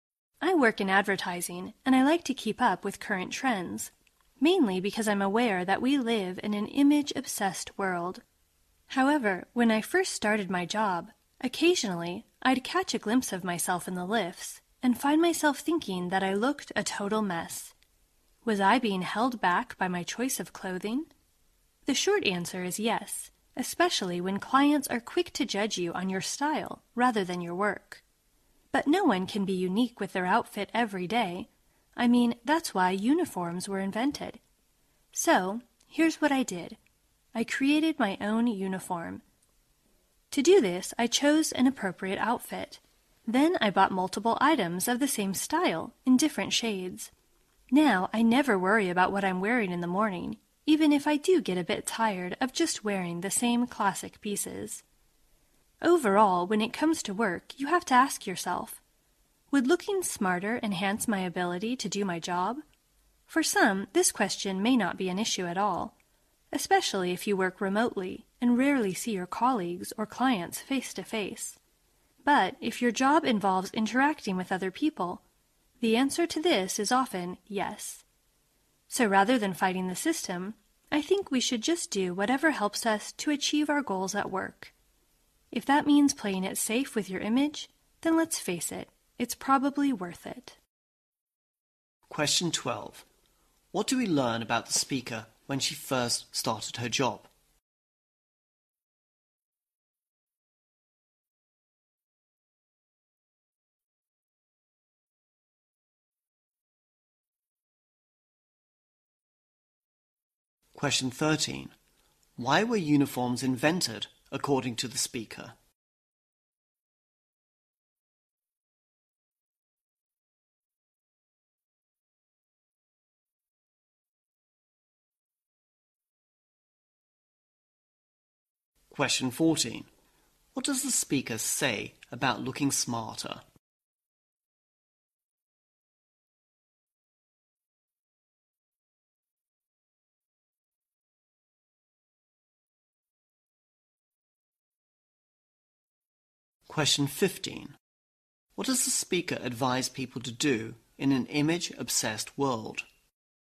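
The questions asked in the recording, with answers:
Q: What do we learn about the speaker when she first started her job?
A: She sometimes thought she looked a total mess.

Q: Why were uniforms invented, according to the speaker?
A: Because no one can be unique with their outfit every day.

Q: What does the speaker advise people to do in an image-obsessed world?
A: Do whatever helps them achieve their goals at work, even playing it safe with their image.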